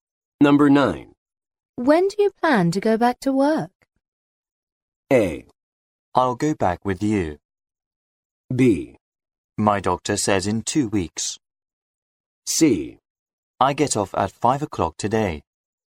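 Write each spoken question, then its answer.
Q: When do you plan to go back to work?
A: B: My doctor says in 2 weeks.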